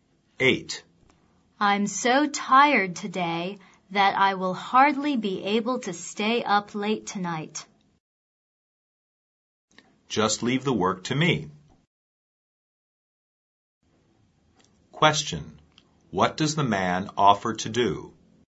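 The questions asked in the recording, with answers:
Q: What does the man offer to do?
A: To do the work for her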